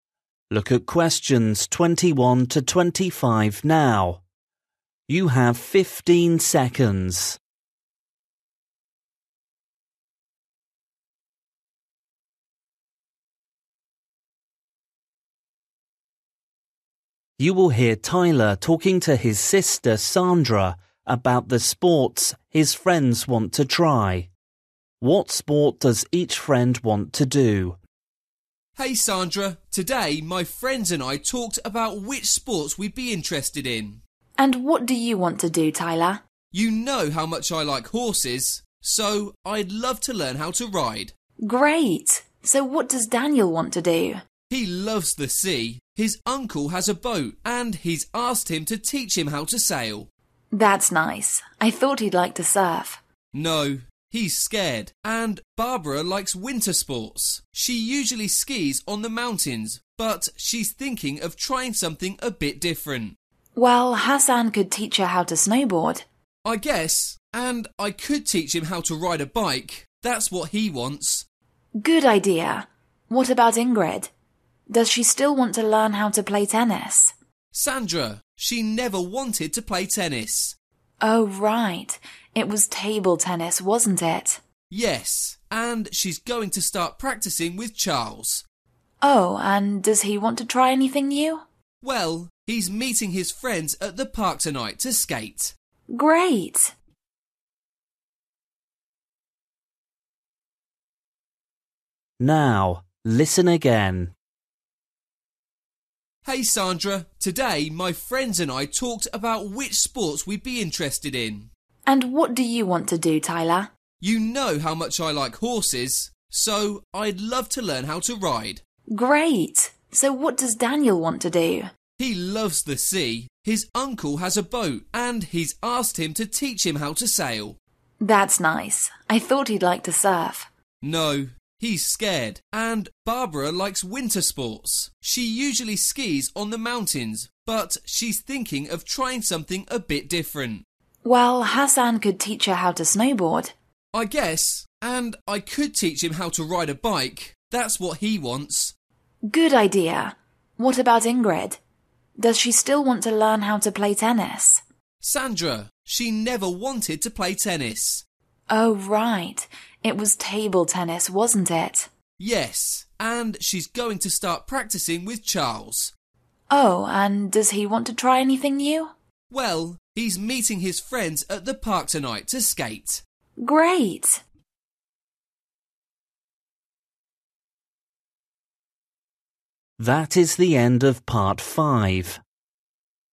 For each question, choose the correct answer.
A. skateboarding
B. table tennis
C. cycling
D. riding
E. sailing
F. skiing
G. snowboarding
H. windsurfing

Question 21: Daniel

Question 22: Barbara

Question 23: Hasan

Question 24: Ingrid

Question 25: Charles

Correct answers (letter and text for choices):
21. E. sailing
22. G. snowboarding
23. C. cycling
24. B. table tennis
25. A. skateboarding

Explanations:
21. He loves the sea. His uncle has a boat and he's asked him to teach him how to sail.
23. I guess and I could teach him how to ride a bike. That's what he wants.
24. It was table tennis, wasn't it?
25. he's meeting his friends at the park tonight to skate.

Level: KET (A2)